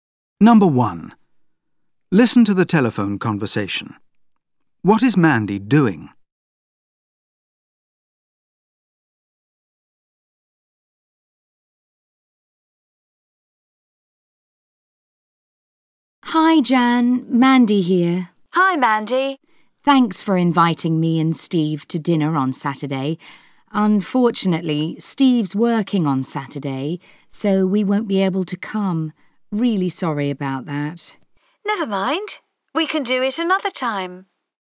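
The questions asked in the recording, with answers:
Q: What is Mandy doing?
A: Turning down Jan's dinner invitation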